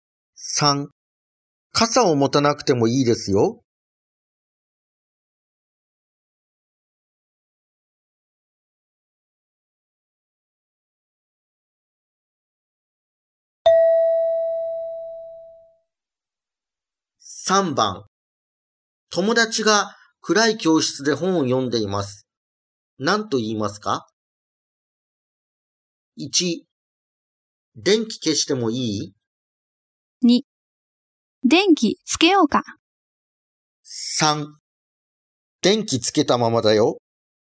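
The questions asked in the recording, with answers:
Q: 何と言いますか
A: 2: 電気つけようか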